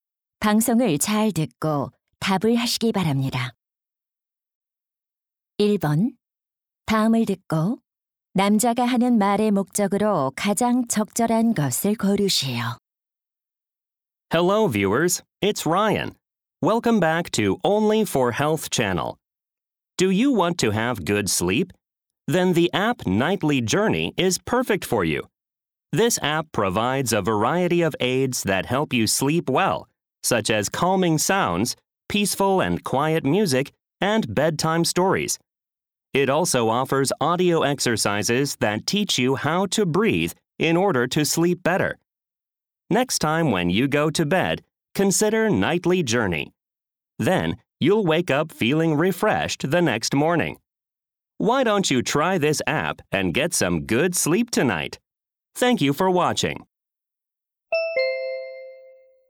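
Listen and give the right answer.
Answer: 수면 앱 Nightly Journey를 홍보하려고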